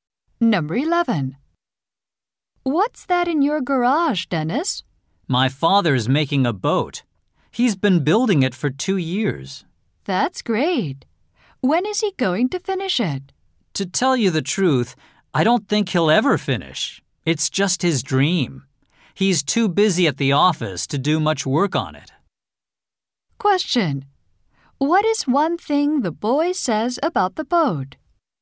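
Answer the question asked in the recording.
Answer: He thinks his father will never finish it.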